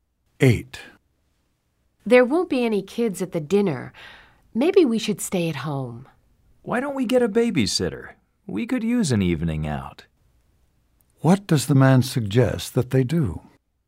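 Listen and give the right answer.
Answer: Get a babysitter and go out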